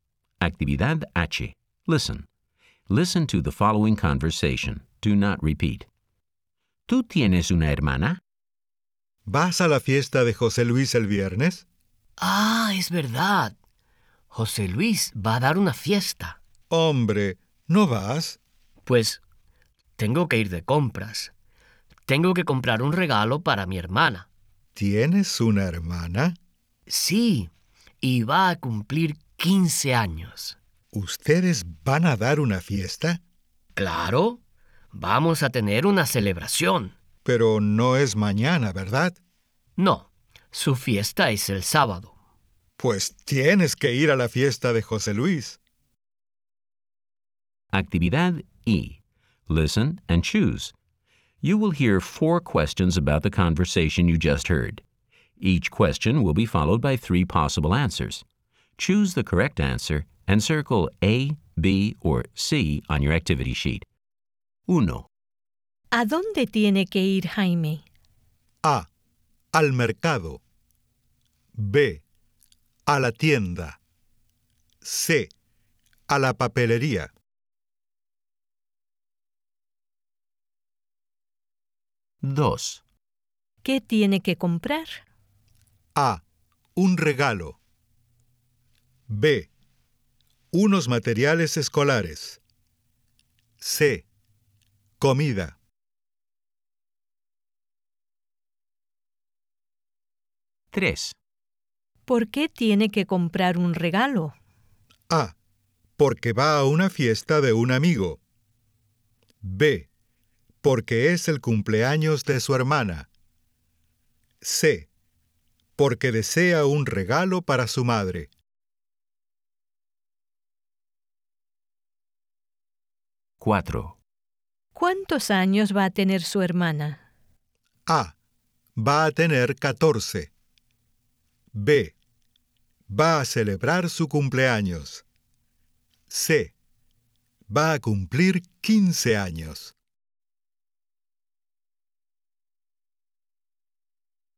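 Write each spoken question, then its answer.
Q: ¿Qué tiene que comprar?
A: A: Un regalo.

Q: ¿Por qué tiene que comprar un regalo?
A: B: Porque es el cumpleaños de su hermana.

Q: ¿Cuántos años va a tener su hermana?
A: C: Va a cumplir 15 años.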